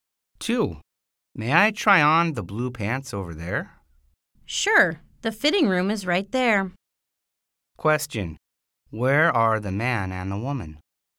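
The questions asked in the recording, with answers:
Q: Where are the man and the woman?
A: In a clothing store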